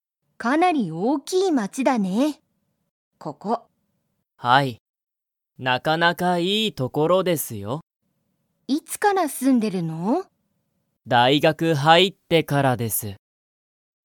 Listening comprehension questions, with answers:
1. ここは、____街まちだ。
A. 少すこし大おおきい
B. ちょっと小ちいさい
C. かなり大おおきい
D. なかなか小ちいさい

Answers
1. C

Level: Level 1

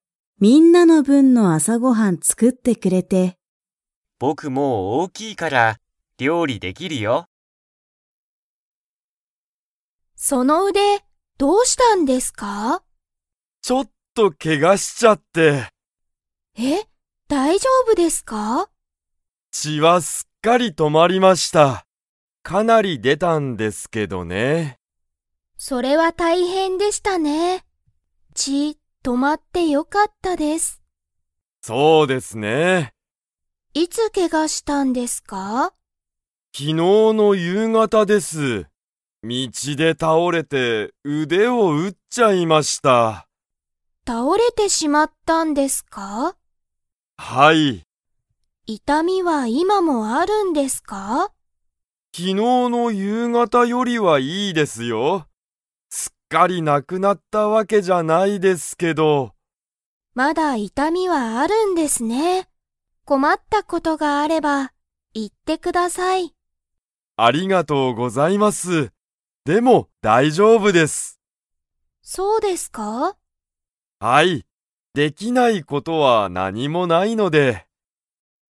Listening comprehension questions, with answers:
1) 岡本おかもとさんの腕うでは、血ちが 。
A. 止とまっている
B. 止とまっていない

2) 岡本おかもとさんは、昨日きのうのいつ、けがしましたか?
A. 朝あさ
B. 昼ひる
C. 夕方ゆうがた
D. 夜中よなか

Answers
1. A
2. C

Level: Level 4

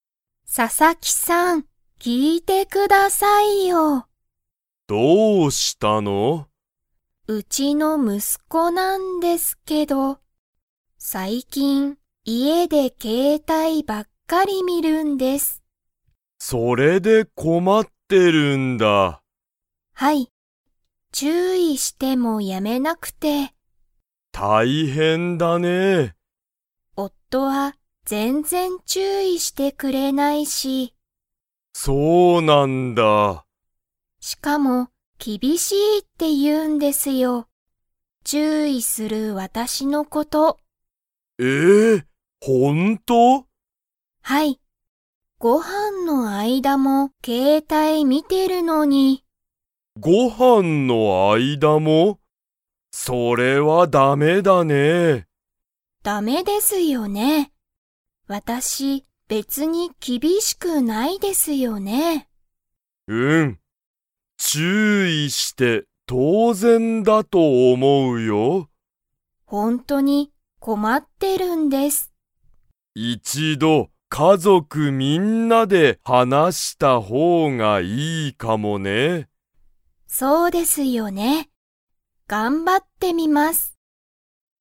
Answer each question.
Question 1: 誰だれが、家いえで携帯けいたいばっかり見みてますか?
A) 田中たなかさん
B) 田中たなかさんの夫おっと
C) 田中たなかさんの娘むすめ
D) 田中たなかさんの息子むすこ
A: D

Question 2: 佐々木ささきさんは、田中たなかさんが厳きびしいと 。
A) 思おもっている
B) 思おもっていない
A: B

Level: Level 3

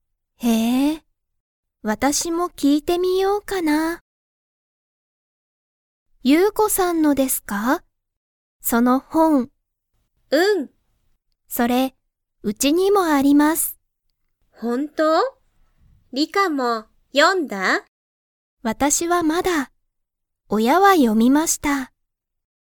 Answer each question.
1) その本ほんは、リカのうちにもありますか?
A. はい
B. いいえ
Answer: A

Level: Level 1

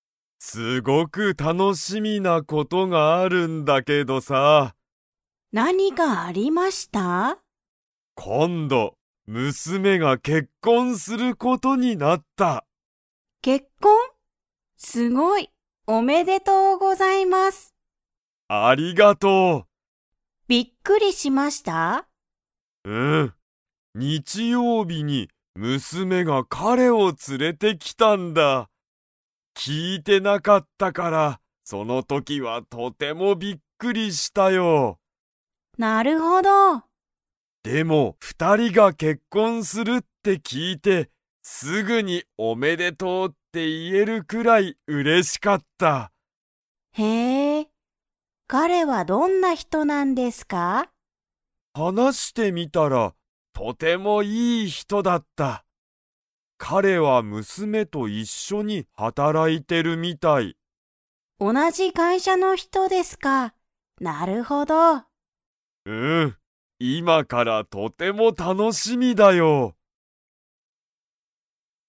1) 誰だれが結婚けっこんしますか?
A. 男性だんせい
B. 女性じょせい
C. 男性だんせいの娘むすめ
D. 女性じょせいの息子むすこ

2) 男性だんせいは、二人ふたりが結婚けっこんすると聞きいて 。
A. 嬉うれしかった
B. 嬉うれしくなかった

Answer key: 1C, 2A

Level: Level 3

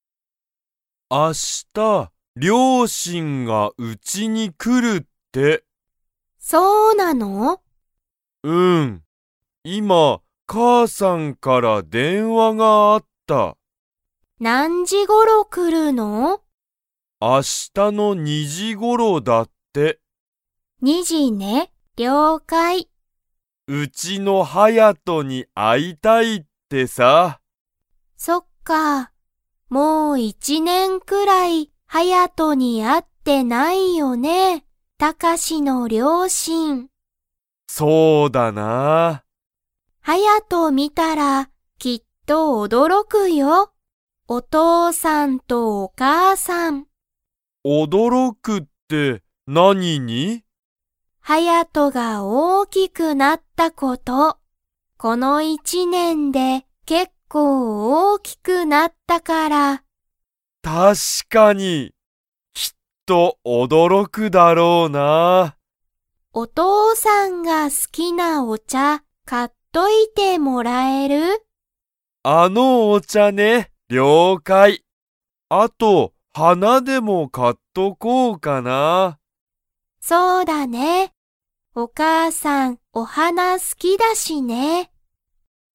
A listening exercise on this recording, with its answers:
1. タカシの両親りょうしんは、いつ来きますか?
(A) 今日きょう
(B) 明日あした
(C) 2日ふつか後ご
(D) 1年いちねん後ご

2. タカシのお母かあさんは、お花はなが 。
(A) 好すき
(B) 好すきじゃない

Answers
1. B
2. A

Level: Level 3

